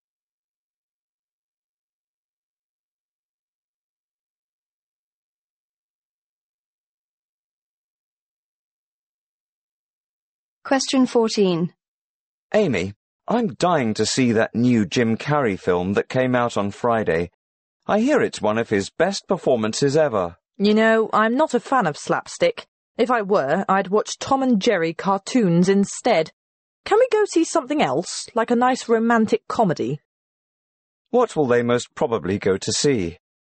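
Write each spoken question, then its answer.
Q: What will they most probably go to see?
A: A romantic comedy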